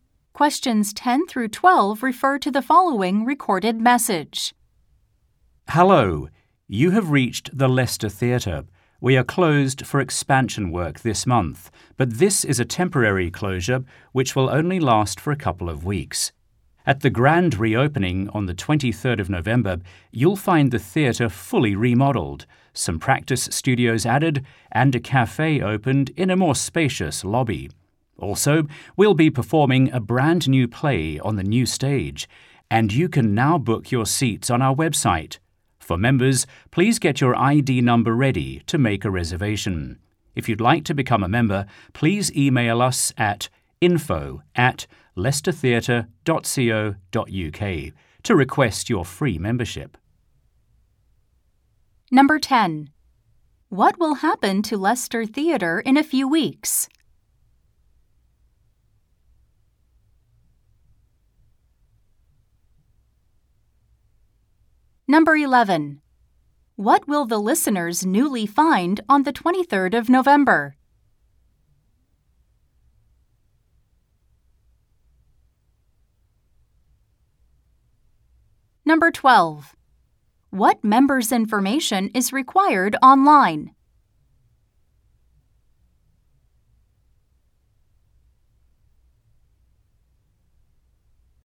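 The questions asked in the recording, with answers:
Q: What will happen to Leicester Theatre in a few weeks?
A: It will reopen after its expansion work

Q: What members' information is required online?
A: Their ID number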